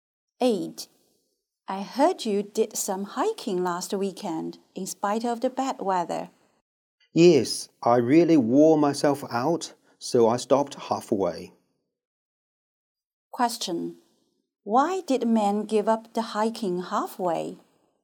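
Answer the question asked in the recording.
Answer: He was worn out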